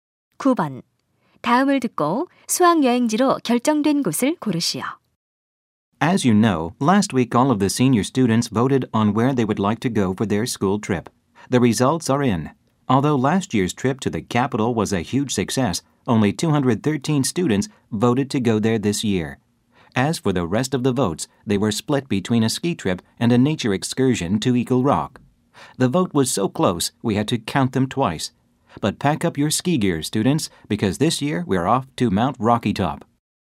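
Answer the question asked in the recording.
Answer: Mount Rocky Top (스키 여행)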